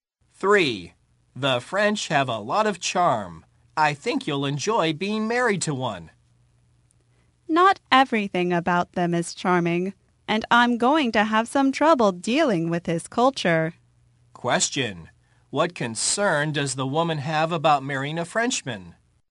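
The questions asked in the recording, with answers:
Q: What concern does the woman have about marrying a Frenchman?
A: Trouble dealing with his culture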